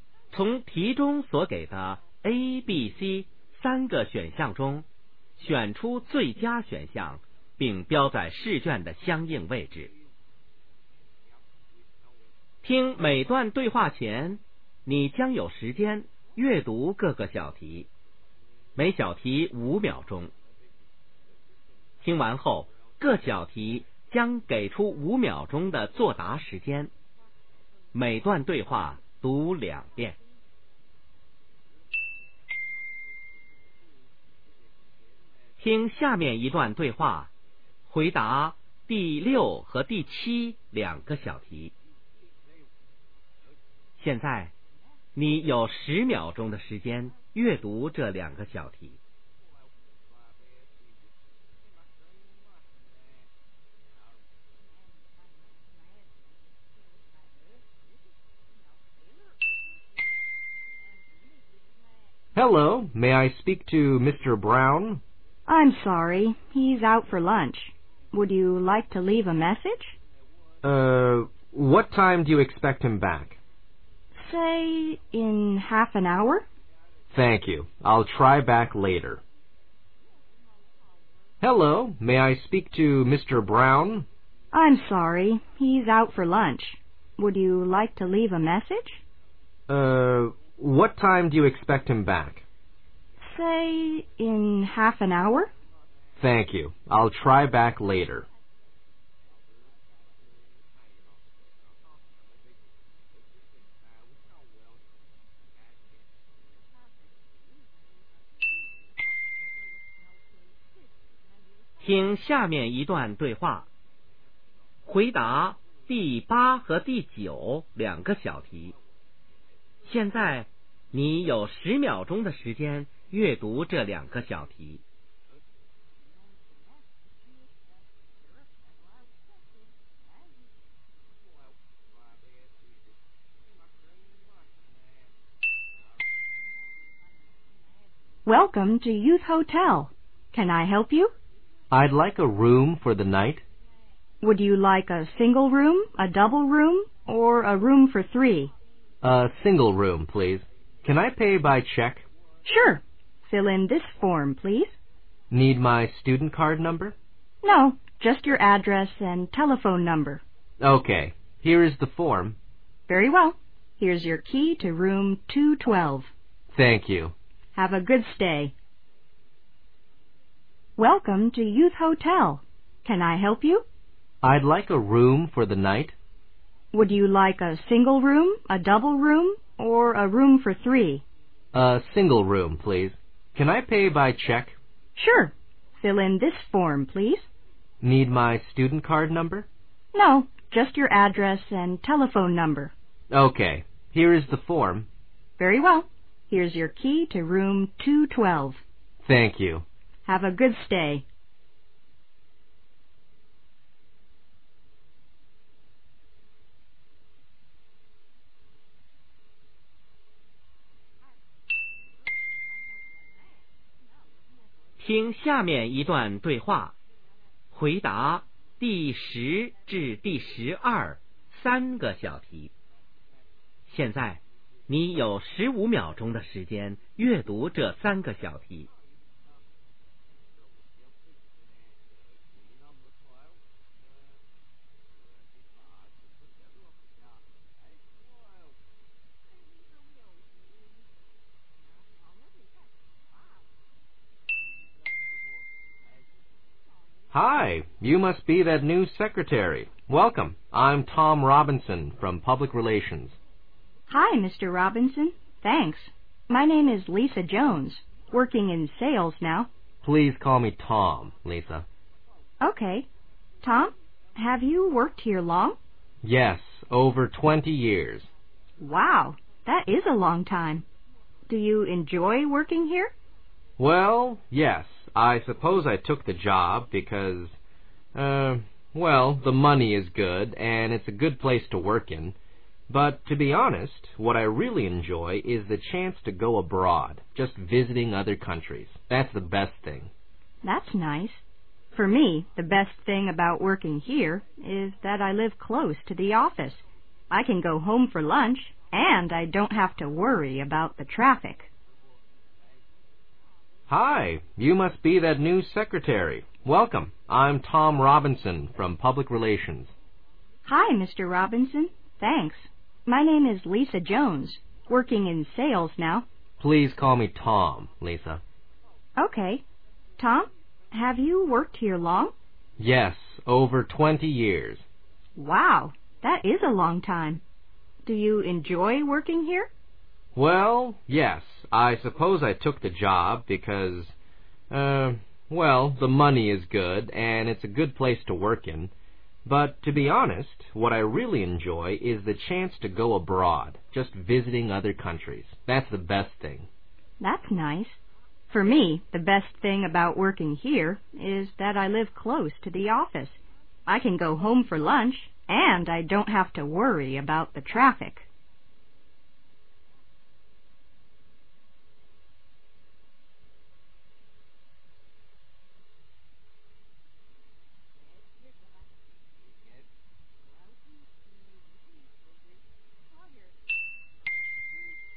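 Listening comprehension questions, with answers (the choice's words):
听下面5段对话。每段对话后有几个小题,从题中所给的A、B、C三个选项中选出最佳选项,并标在试卷的相应位置。听每段对话前,你将有时间阅读各个小题,每小题5秒钟;听完后,各小题将给出5秒钟的作答时间。每段对话读两遍。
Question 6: What can we learn about Mr.Brown?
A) He is in his office.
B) He is at a meeting.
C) He is out for a meal.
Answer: He is out for a meal.

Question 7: What will the man probably do next?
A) Call back.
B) Come again.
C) Leave a message.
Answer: Call back.

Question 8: What kind of room does the man want to take?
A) A single room.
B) A double room.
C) A room for three.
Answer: A single room.

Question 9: What does the man need to put in the from?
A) Telephone and student card numbers.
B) Student card number and address.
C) Address and telephone number.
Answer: Address and telephone number.

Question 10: What is the relationship between the speakers?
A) Fellow clerks.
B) Boss and secrecary.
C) Customer and salesperson.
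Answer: Fellow clerks.

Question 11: What does the man like about his job?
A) Living close to the office.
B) Chances to go abroad.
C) Nice people to work with.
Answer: Chances to go abroad.

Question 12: What do we know about the woman?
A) She likes traveling.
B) She is new to the company.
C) She works in public relstions.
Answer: She is new to the company.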